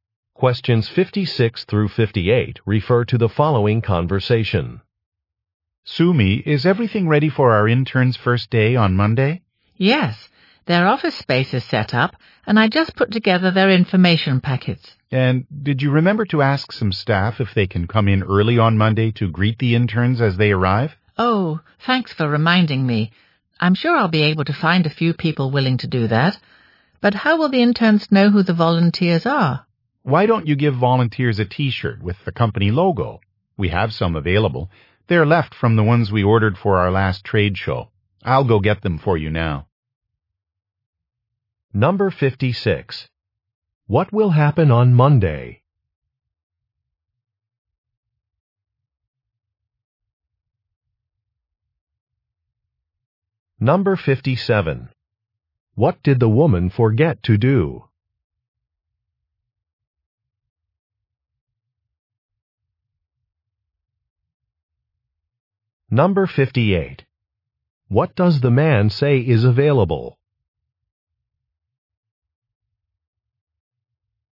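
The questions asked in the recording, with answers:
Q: What will happen on Monday?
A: Interns will start work

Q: What did the woman forget to do?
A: Ask staff to come in early to greet the interns

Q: What does the man say is available?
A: T-shirts with the company logo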